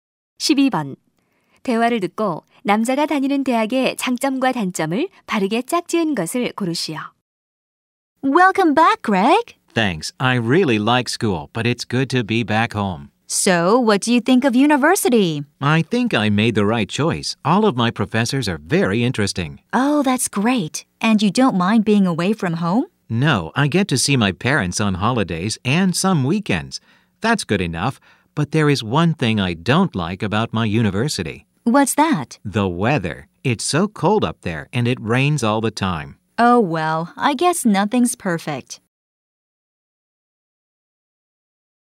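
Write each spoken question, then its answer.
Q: 대화를 듣고 남자가 다니는 대학의 장점과 단점을 바르게 짝지은 것을 고르시오.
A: 장점: 교수님들이 흥미로움, 단점: 날씨가 춥고 비가 자주 옴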